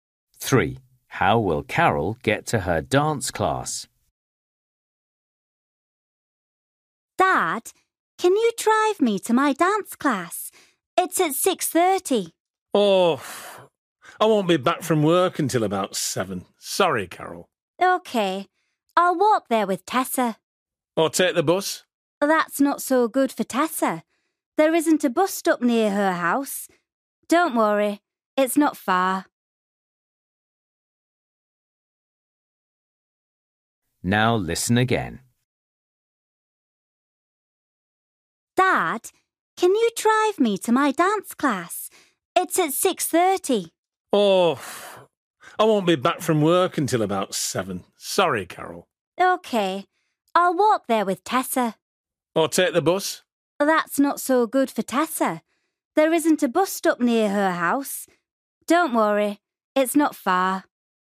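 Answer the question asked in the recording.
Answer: She will walk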